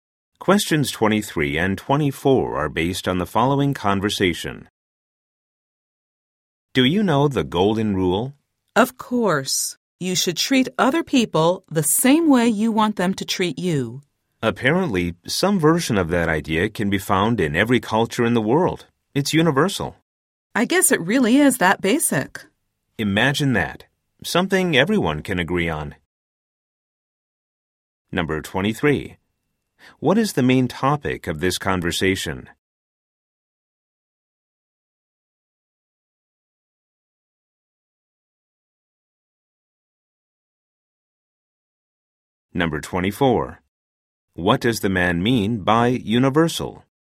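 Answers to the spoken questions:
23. The golden rule
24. Found in every culture in the world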